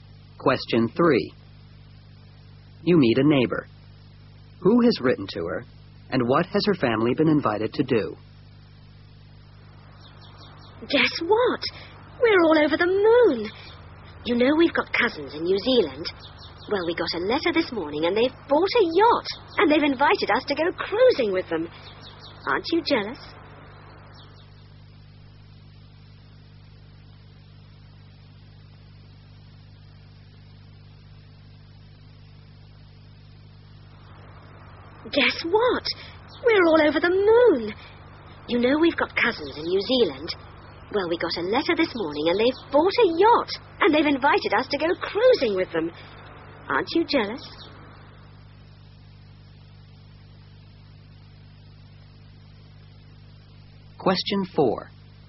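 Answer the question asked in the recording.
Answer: Her cousins in New Zealand; to go cruising on their yacht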